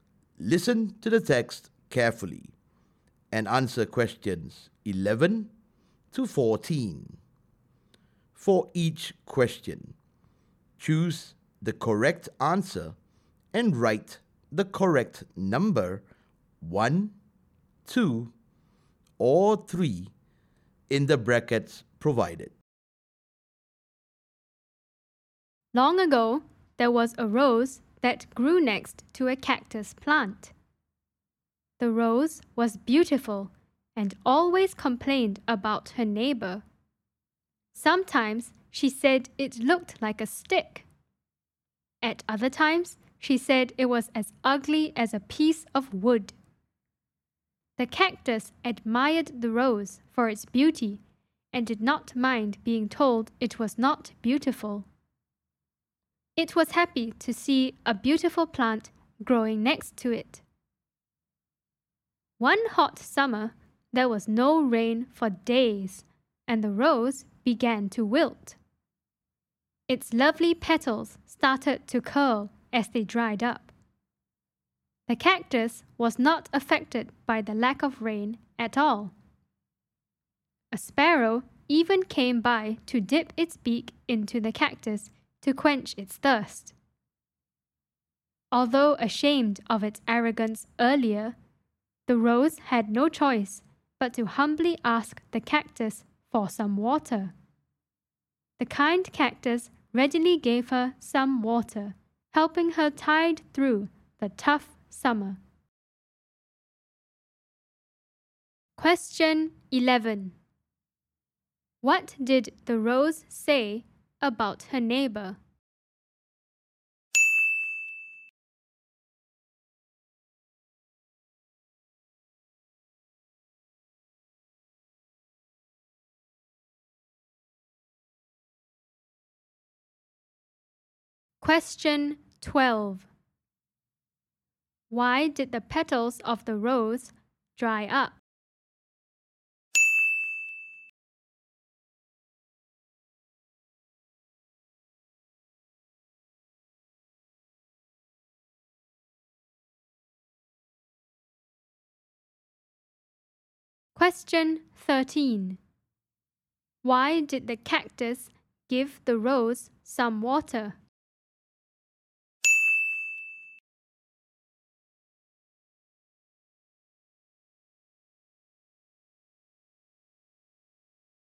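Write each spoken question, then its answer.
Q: What did the rose say about her neighbor?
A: It looked like a stick and was as ugly as a piece of wood

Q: Why did the petals of the rose dry up?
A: There was no rain for days in the hot summer

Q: Why did the cactus give the rose some water?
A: The cactus was kind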